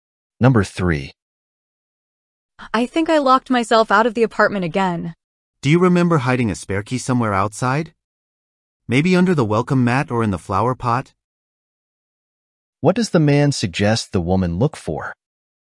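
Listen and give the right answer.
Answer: A spare key hidden outside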